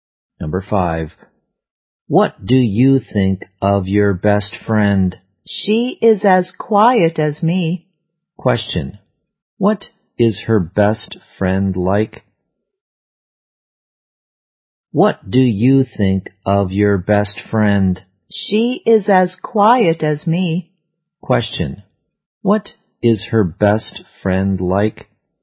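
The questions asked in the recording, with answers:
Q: What is her best friend like?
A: Quiet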